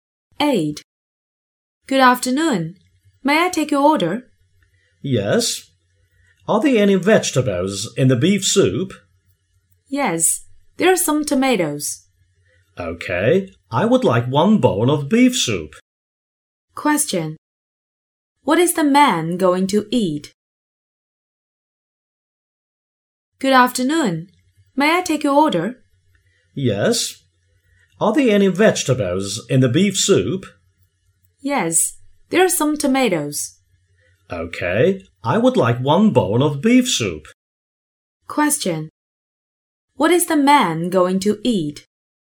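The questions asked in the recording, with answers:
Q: Question. What is the man going to eat?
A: Beef soup (with tomatoes)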